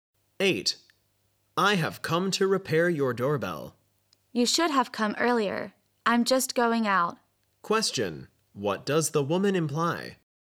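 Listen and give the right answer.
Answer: The repairman came too late; she can't let him fix it now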